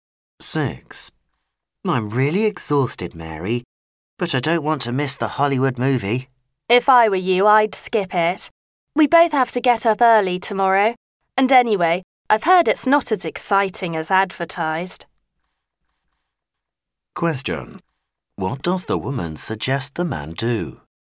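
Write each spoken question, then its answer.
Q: What does the woman suggest the man do?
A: Skip the movie and get some rest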